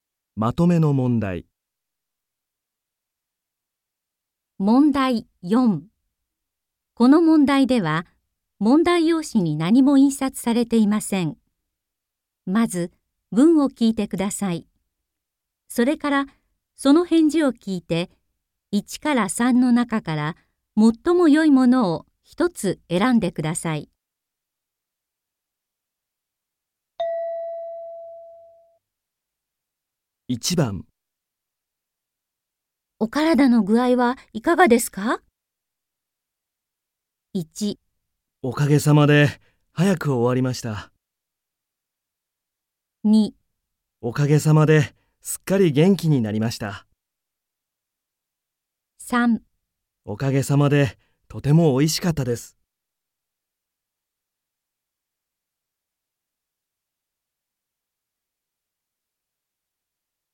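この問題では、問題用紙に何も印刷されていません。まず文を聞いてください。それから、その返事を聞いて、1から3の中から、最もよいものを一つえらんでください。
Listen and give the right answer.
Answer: おかげさまで、すっかり元気になりました。

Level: N3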